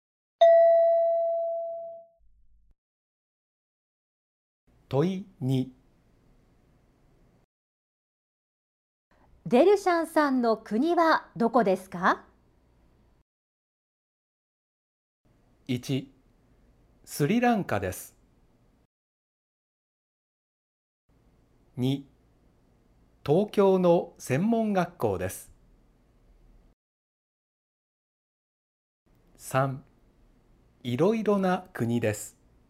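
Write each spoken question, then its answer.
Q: デルシャンさんの国はどこですか?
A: 1: スリランカです。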